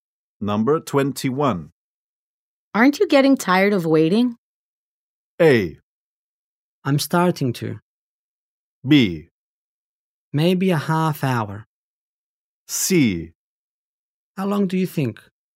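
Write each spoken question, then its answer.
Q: Aren't you getting tired of waiting?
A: A: I'm starting to.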